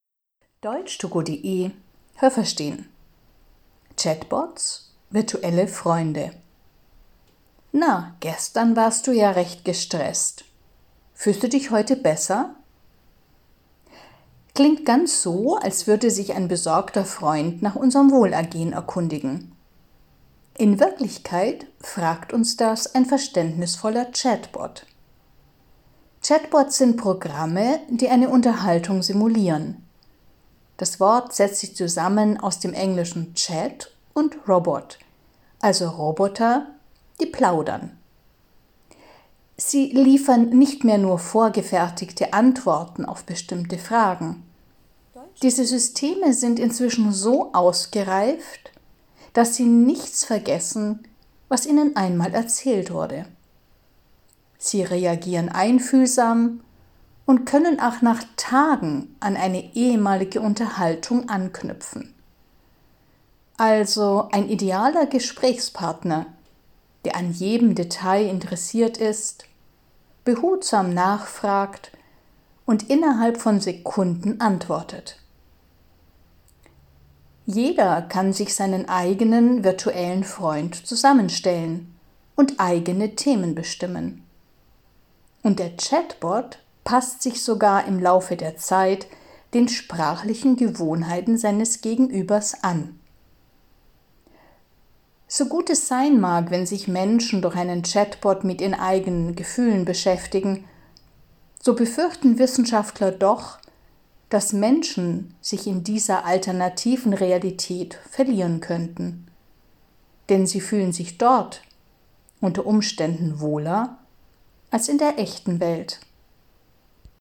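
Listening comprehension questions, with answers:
Welches Adjektiv passt?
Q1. Na, gestern warst du ja recht _____ . Fühlst du dich heute besser?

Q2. Chatbots können einem Verständnis entgegenbringen, sind also sehr _____ .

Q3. Frühere Chatbots lieferten vor allem _____ Antworten.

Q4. Chatbot-Systeme sind inzwischen sehr _____.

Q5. Chatbots können sehr _____ reagieren.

Haben Sie das gehört? Stimmt diese Aussage?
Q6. Chatbots sind außerstande, sich wie gute Freunde nach unserem Wohlergehen zu erkundigen.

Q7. Chatbots sind Roboter, die plaudern können, aber ausschließlich vorbereitete Antworten liefern.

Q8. Chatbots sind sehr einfühlsame und interessierte Gesprächspartner, die aber bisher noch nicht in der Lage sind, sich auf frühere Gespräche zu beziehen.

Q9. Jeder kann sich seinen individuellen virtuellen Freund gestalten, der auch lernt, sich sprachlich an den Gesprächspartner anzupassen.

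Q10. Wenn Menschen sich bei Redebedarf an einen Chatbot wenden, führt das unwillkürlich zu einem Realitätsverlust.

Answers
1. gestresst
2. verständnisvoll
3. vorgefertigte
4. ausgereift
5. einfühlsam
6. falsch
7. falsch
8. falsch
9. richtig
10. falsch

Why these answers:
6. Sie können wie gute Freunde zu uns sprechen.
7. Sie können inzwischen mehr, als nur vorgefertigte Antworten zu liefern.
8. Sie sind sogar inzwischen in der Lage, an frühere Unterhaltungen anzuknüpfen.
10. Das ist nicht automatisch der Fall. Aber die Gefahr ist groß, dass das passiert.

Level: C (schwer)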